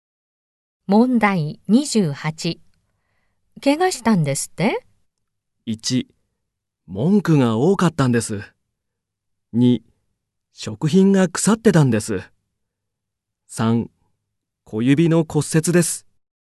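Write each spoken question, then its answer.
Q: 怪我したんですって?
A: 3: 小指の骨折です。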